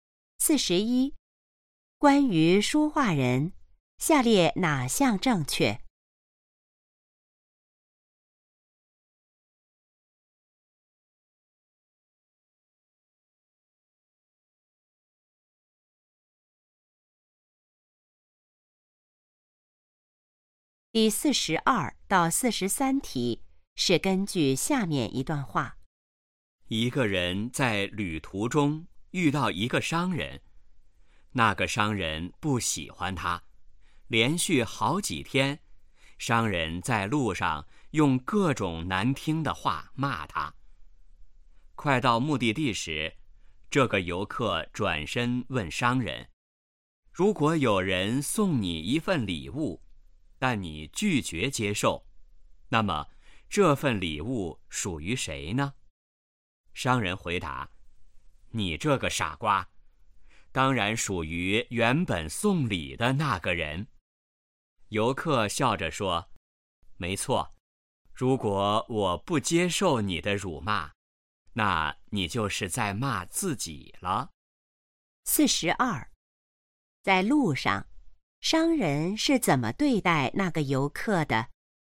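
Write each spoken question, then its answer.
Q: 在路上商人是怎么对待那个游客的?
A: 用各种难听的话骂他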